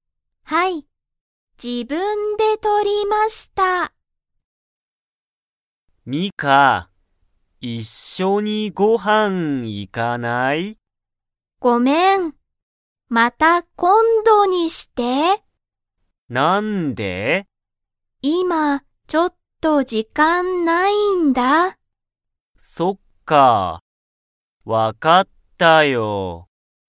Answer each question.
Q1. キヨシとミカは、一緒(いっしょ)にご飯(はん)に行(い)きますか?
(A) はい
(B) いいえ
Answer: B

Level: Level 1

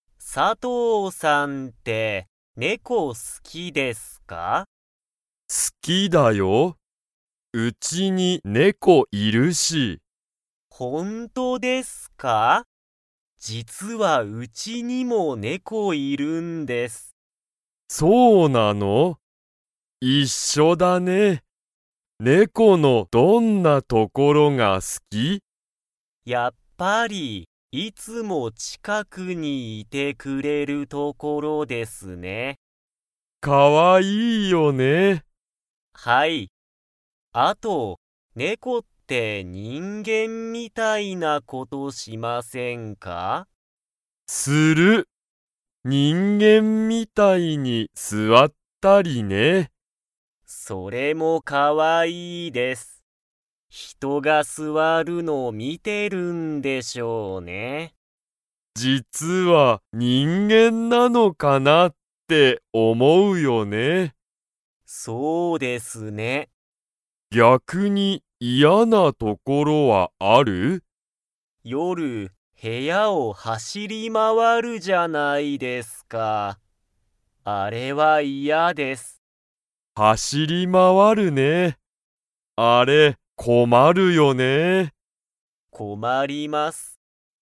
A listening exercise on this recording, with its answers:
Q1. 佐藤さとうさんのうちに猫ねこはいますか?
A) はい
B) いいえ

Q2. 夜よる、猫ねこが部屋へやを のが困こまる。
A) 座すわる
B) しゃべる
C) 走はしり回まわる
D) 寝ねれる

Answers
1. A
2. C

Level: Level 3

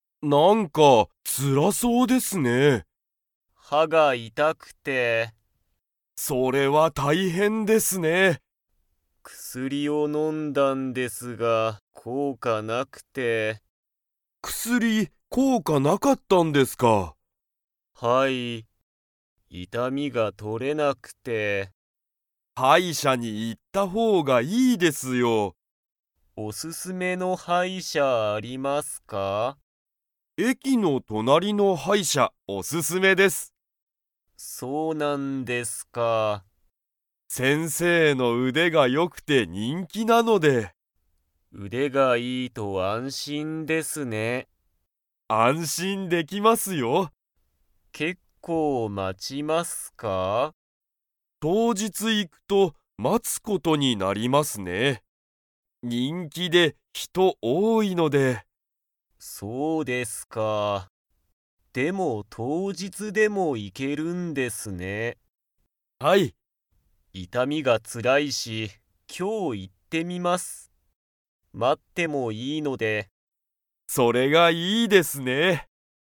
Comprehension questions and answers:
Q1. 山田やまださんは、どこが痛いたいですか?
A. 頭あたま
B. 歯は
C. 口くち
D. 足あし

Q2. 山田やまださんは、今日きょう病院びょういんに 。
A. 行いく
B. 行いかない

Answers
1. B
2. A

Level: Level 4

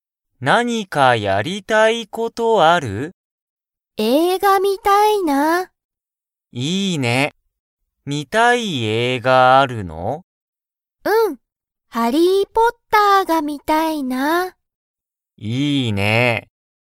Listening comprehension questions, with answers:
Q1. ゆうたとかおりは、____を観(み)る。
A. 本(ほん)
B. 問題(もんだい)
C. 映画(えいが)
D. 英語(えいご)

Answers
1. C

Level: Level 1

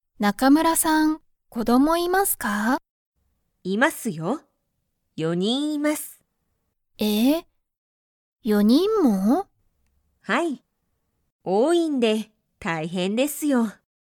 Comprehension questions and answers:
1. 中村(なかむら)さんは、子供(こども)がいますか?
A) はい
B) いいえ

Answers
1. A

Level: Level 1

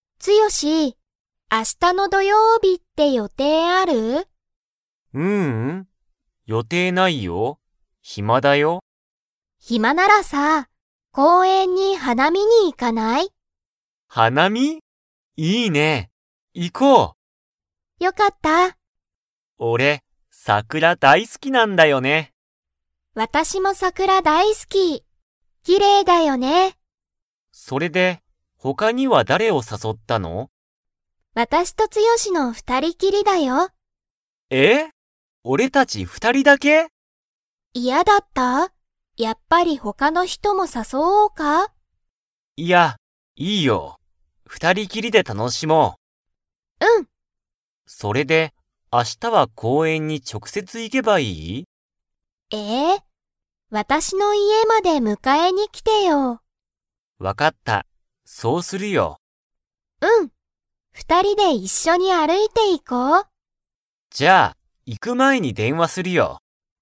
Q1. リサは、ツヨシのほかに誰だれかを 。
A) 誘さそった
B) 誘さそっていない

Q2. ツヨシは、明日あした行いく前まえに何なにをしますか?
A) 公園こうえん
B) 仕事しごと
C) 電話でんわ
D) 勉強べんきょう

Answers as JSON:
{"1": "B", "2": "C"}

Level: Level 4

